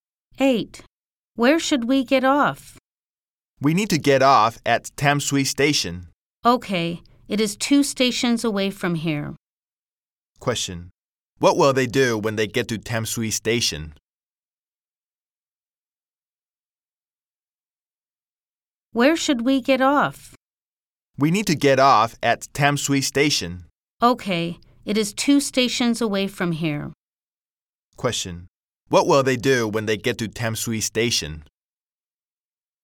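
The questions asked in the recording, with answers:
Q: Question. What will they do when they get to Tam Sui Station?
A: Get off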